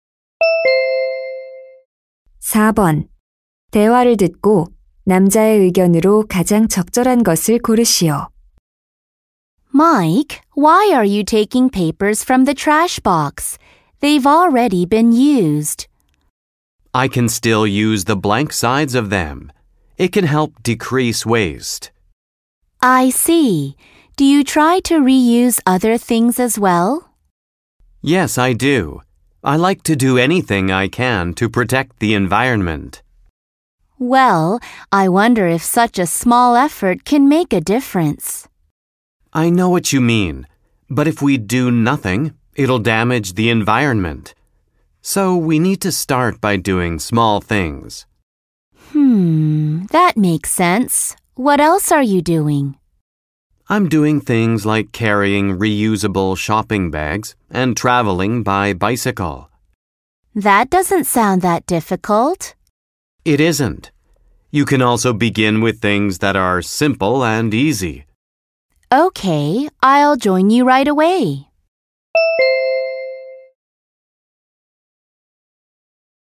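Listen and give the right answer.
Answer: 환경 보호를 위해 작은 일부터 실천해야 한다.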